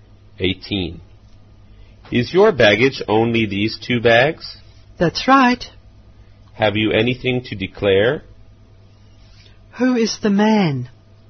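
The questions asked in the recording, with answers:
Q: Who is the man?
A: A customs officer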